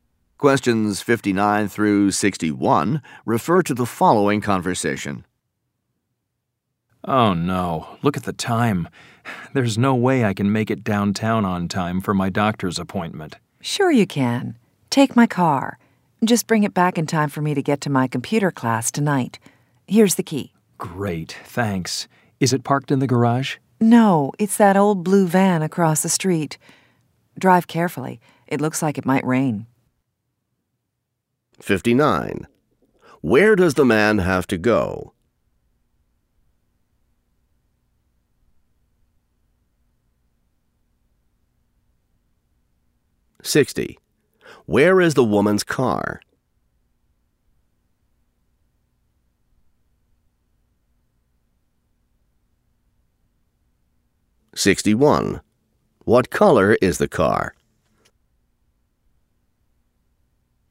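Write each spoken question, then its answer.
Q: Where does the man have to go?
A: To a doctor's appointment downtown

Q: Where is the woman's car?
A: Across the street

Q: What color is the car?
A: Blue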